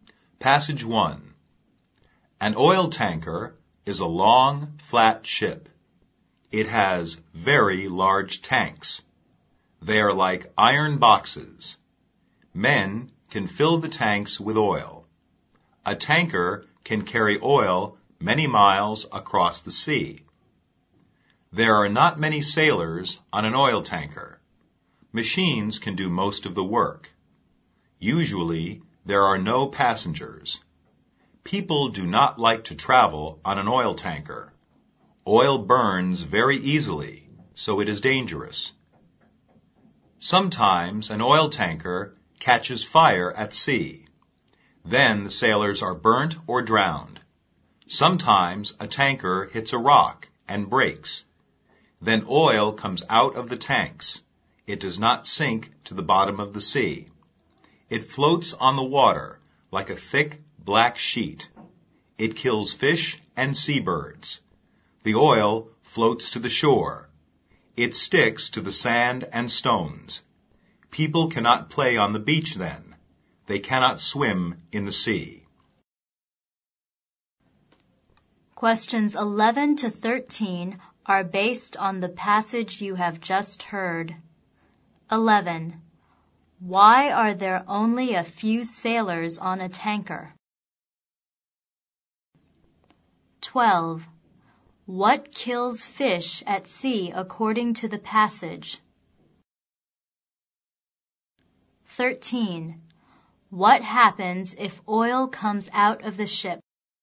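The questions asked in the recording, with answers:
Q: Why are there only a few sailors on a tanker?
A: Machines can do most of the work

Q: What kills fish at sea according to the passage?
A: Oil floating on the water

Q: What happens if oil comes out of the ship?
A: It floats on the water, kills fish and seabirds, and sticks to the shore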